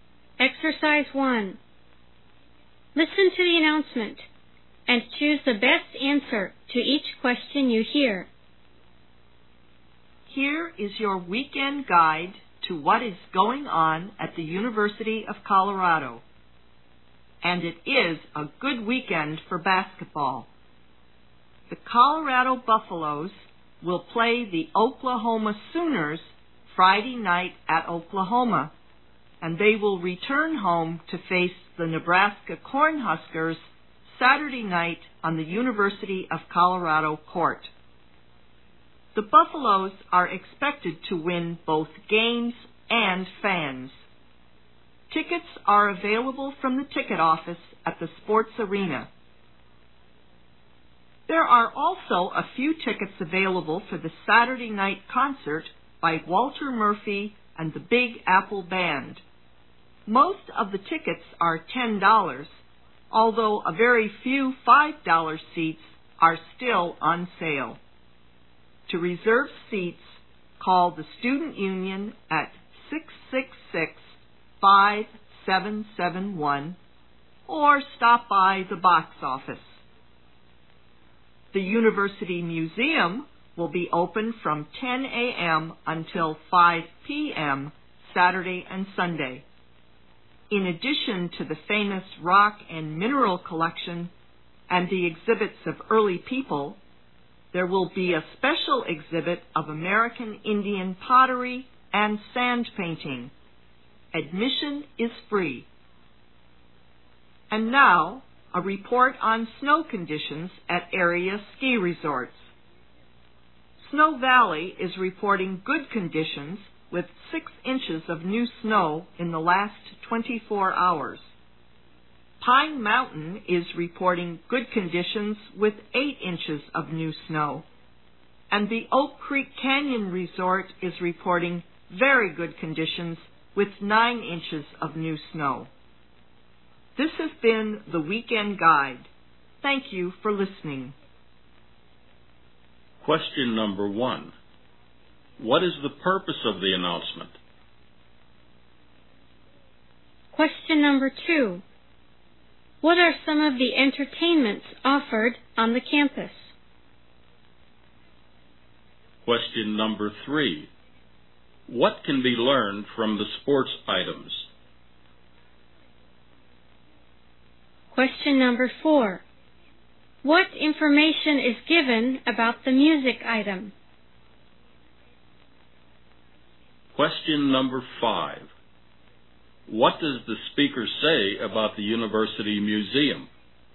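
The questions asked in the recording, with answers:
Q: What is the purpose of the announcement?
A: To give a guide to weekend events at the University of Colorado

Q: What are some of the entertainments offered on the campus?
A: A basketball game, a concert and a museum exhibit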